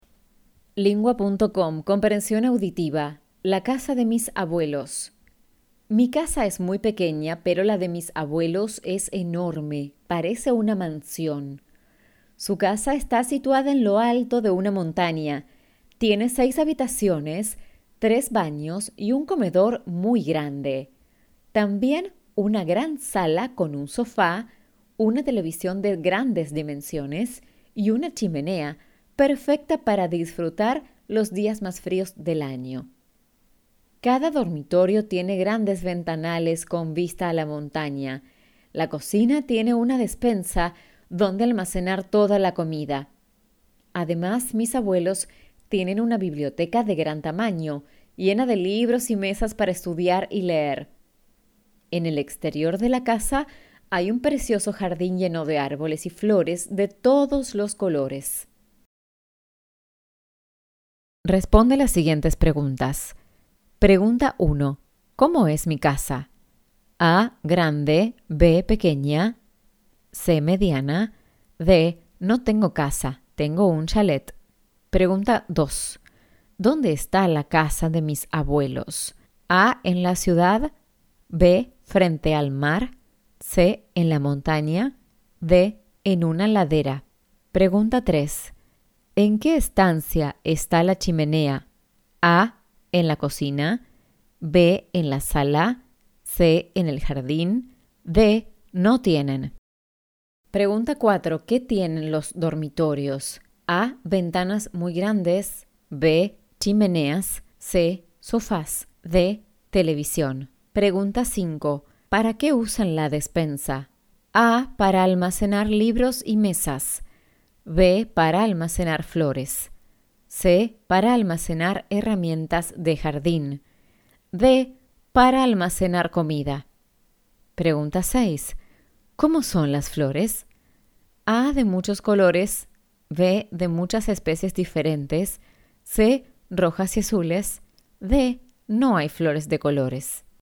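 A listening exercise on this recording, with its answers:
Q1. ¿Cómo es mi casa?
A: Pequeña

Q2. ¿Dónde está la casa de mis abuelos?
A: En la montaña

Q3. ¿En qué estancia está la chimenea?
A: En la sala

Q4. ¿Qué tienen los dormitorios?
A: Ventanas muy grandes

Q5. ¿Para qué usan la despensa?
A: Para almacenar comida

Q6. ¿Cómo son las flores?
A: De muchos colores

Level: Basis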